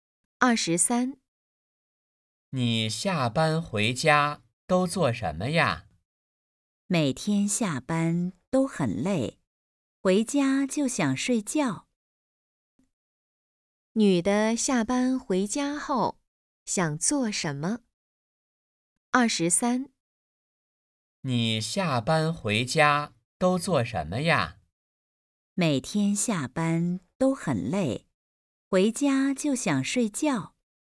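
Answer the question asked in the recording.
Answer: 睡觉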